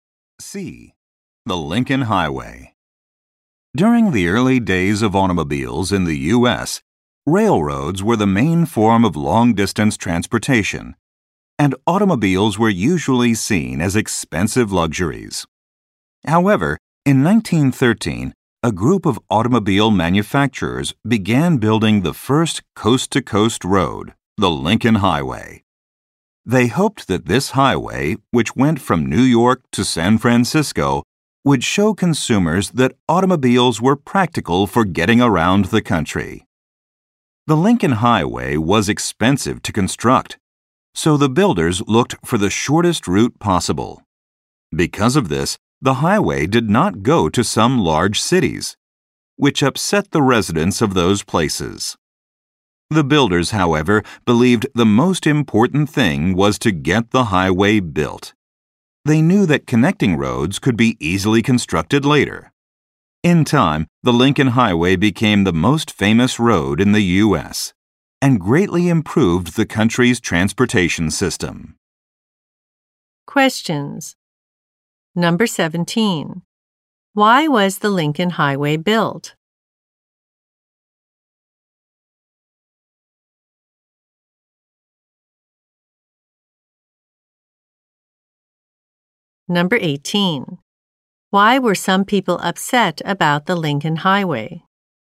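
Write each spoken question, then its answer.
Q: Why was the Lincoln Highway built?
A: To show consumers that cars were practical for getting around the country.

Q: Why were some people upset about the Lincoln Highway?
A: It did not go to some large cities.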